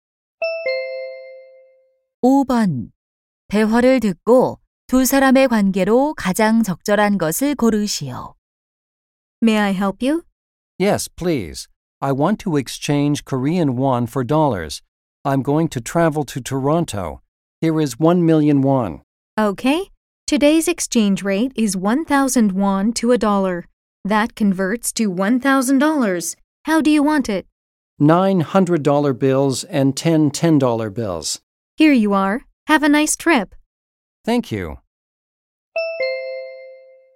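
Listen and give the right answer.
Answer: 은행원과 고객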